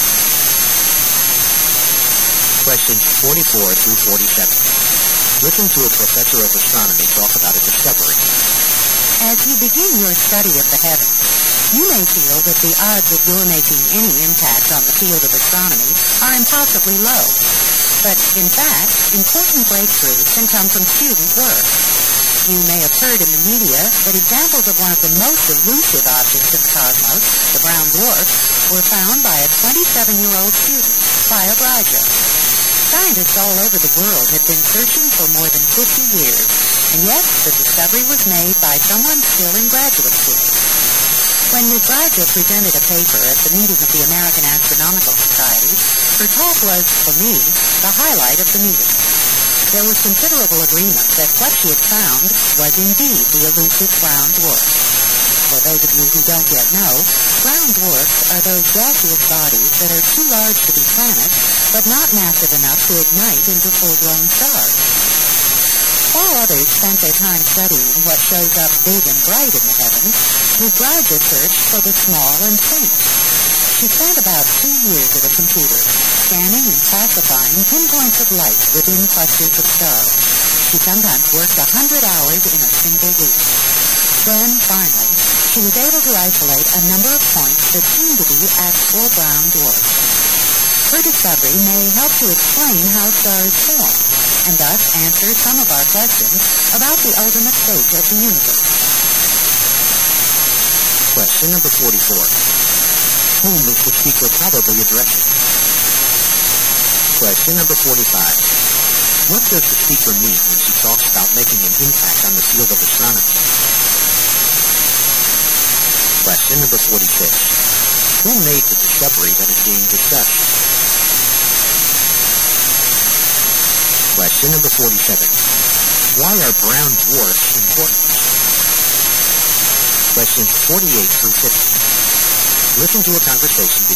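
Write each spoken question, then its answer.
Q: Whom is the speaker probably addressing?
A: Astronomy students

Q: What does the speaker mean when she talks about making an impact on the field of astronomy?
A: Making an important discovery in astronomy

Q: Who made the discovery that is being discussed?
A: A graduate student, Clio Bragia

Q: Why are brown dwarfs important?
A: They may help explain how stars form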